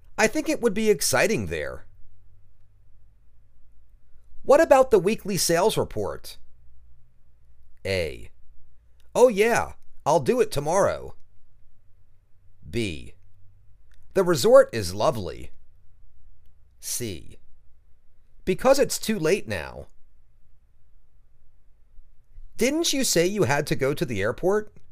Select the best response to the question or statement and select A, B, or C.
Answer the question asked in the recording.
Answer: Oh yeah. I'll do it tomorrow.